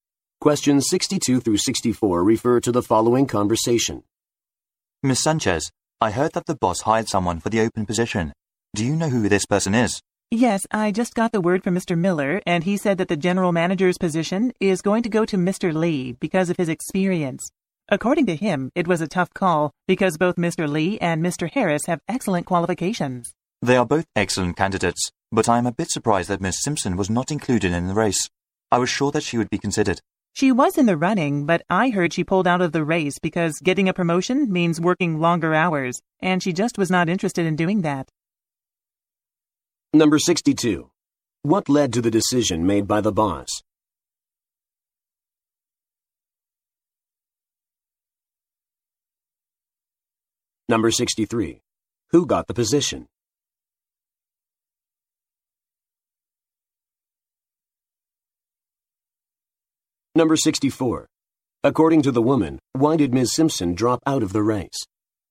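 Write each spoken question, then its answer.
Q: What led to the decision made by the boss?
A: Mr. Lee's experience

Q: Who got the position?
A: Mr. Lee

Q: According to the woman, why did Ms. Simpson drop out of the race?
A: She didn't want to work longer hours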